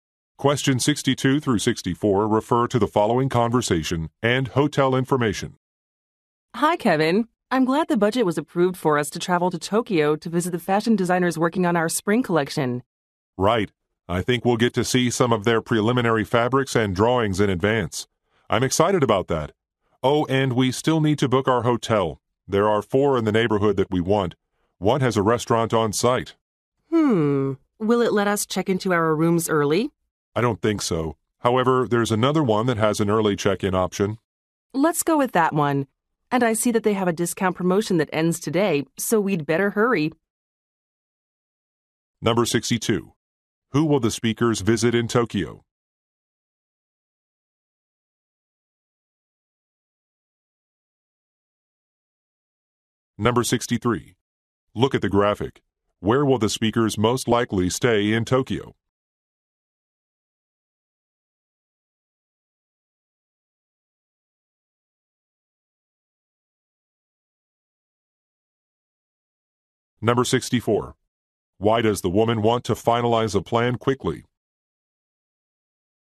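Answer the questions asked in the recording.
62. Fashion designers
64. A discount promotion ends today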